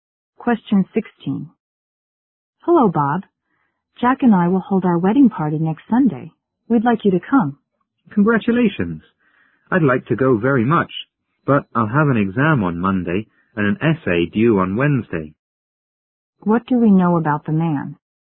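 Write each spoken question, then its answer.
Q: What do we know about the man?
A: He is too busy to go to the wedding party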